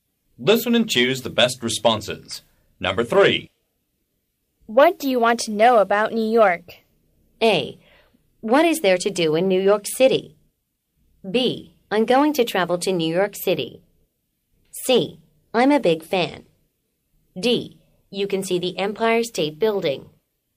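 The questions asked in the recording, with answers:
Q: What do you want to know about New York?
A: A: What is there to do in New York City?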